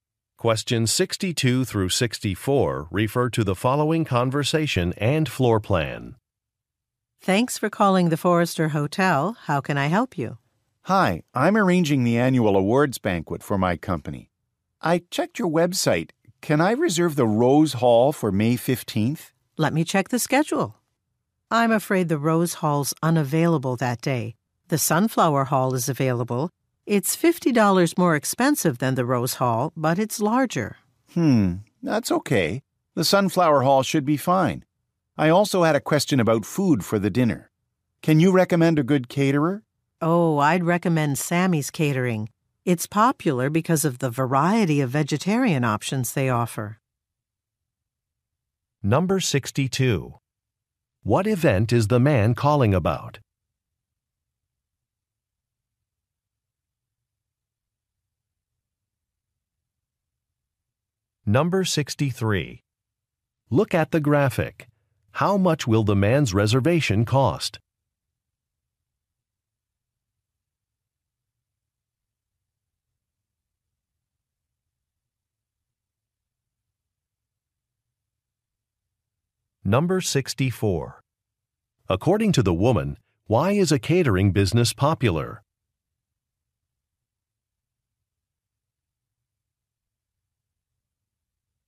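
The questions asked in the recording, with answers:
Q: What event is the man calling about?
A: An annual awards banquet

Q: According to the woman, why is a catering business popular?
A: It offers a variety of vegetarian options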